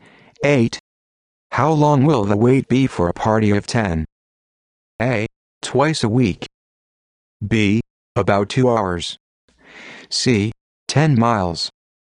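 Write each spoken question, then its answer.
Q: How long will the wait be for a party of 10?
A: B: About 2 hours.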